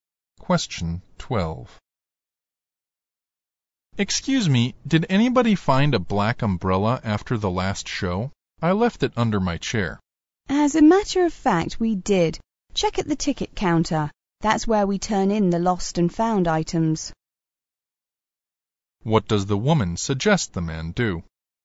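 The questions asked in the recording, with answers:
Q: What does the woman suggest the man do?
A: Check at the ticket counter for his umbrella.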